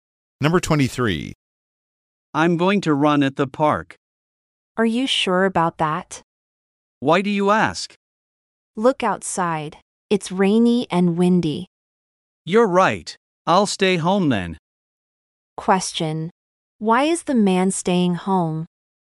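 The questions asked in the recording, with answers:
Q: Why is the man staying home?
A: It's rainy and windy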